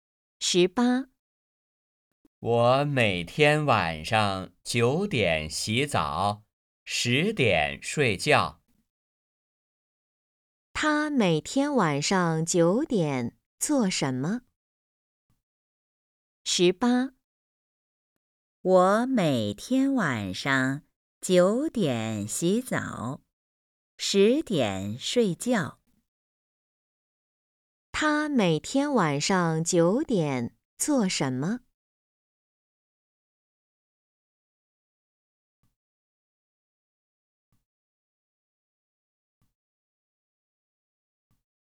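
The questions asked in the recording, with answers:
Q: 他每天晚上9点做什么?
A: 洗澡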